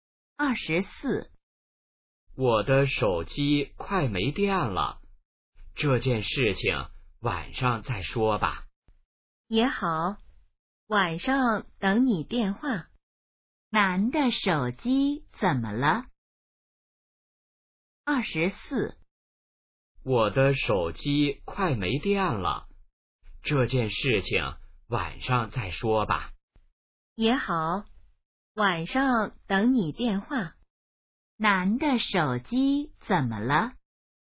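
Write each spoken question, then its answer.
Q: 男的手机怎么了?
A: 快没电了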